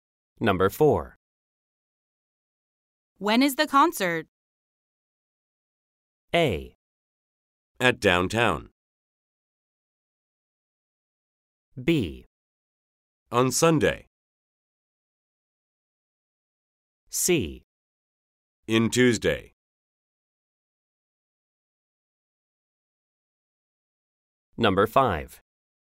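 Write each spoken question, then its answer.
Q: When is the concert?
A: B: On Sunday.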